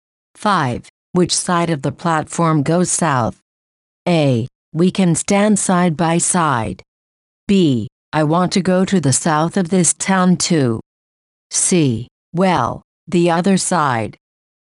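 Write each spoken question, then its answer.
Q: Which side of the platform goes south?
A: C: Well, the other side.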